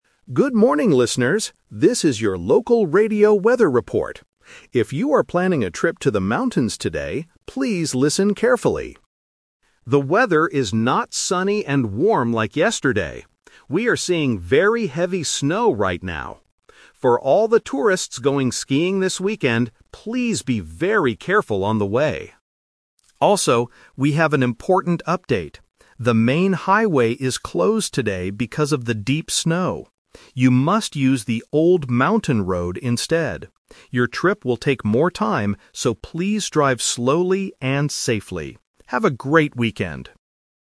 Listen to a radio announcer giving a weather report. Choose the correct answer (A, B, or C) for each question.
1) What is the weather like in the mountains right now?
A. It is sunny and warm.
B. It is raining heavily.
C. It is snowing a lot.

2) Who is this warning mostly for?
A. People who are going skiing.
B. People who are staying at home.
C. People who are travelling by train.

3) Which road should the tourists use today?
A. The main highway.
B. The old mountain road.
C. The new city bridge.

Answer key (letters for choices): 1C, 2A, 3B

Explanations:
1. The announcer says, "We are seeing very heavy snow right now." Option (C) uses "snowing a lot" to paraphrase "heavy snow". Option (A) is the trap; the weather was sunny yesterday, not today. Option (B) is not mentioned.
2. The announcer specifically talks to "all the tourists going skiing this weekend." Options (B) and (C) are not mentioned in the audio.
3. This is The Twist. Usually, people might take the highway, but the announcer says the main highway is "closed", so they "must use the old mountain road instead." Option (A) is the trap (the closed road). Option (C) is not mentioned.

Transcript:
Announcer: Good morning, listeners! This is your local radio weather report. If you are planning a trip to the mountains today, please listen carefully.
The weather is not sunny and warm like yesterday. We are seeing very heavy snow right now. For all the tourists going skiing this weekend, please be very careful on the way.
Also, we have an important update: the main highway is closed today because of the deep snow. You must use the old mountain road instead. Your trip will take more time, so please drive slowly and safely. Have a great weekend!

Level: A2